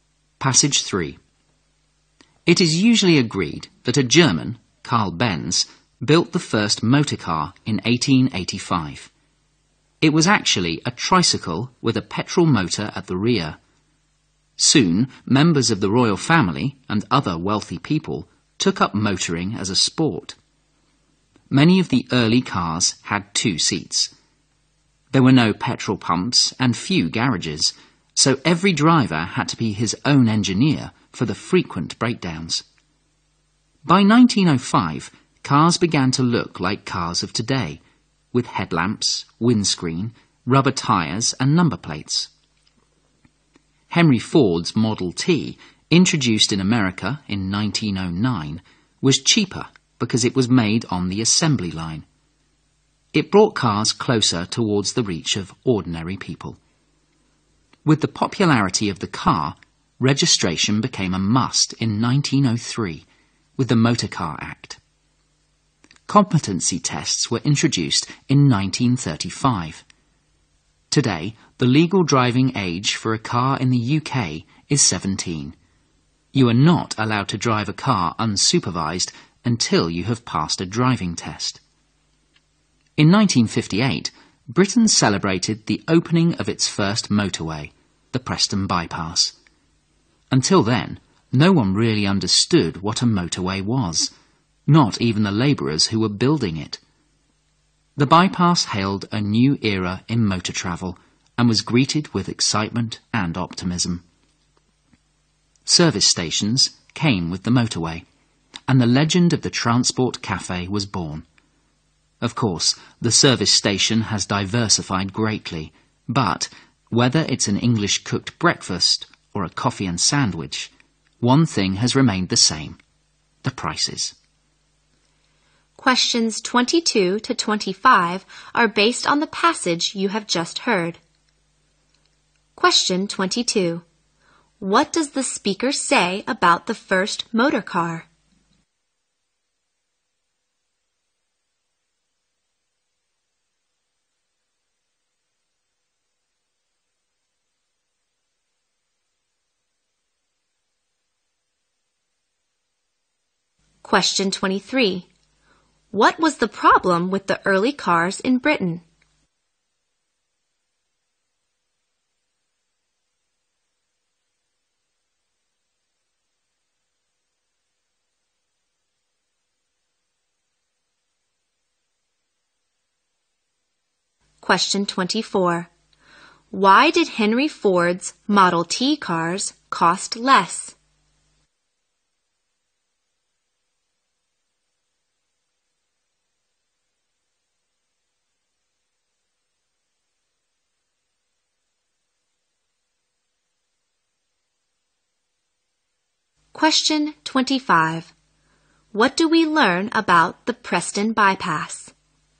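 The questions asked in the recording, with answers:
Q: What does the speaker say about the first motor car?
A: It was a tricycle with a petrol motor at the rear.

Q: What was the problem with the early cars in Britain?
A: They broke down often.

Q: Why did Henry Ford's Model T cars cost less?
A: They were made on the assembly line.

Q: What do we learn about the Preston Bypass?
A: It was Britain's first motorway, opened in 1958.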